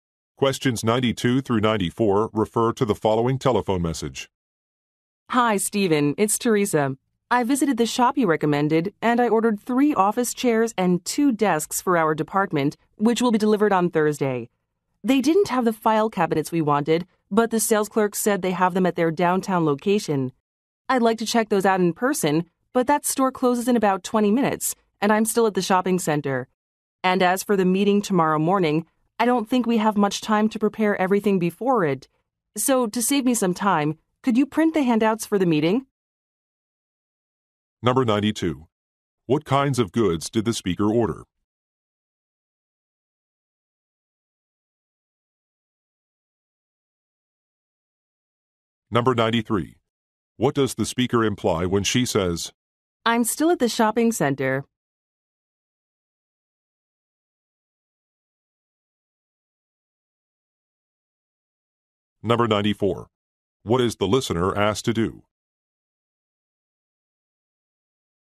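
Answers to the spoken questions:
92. Office furniture (chairs and desks)
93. She can't reach the downtown store before it closes
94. Print handouts for the meeting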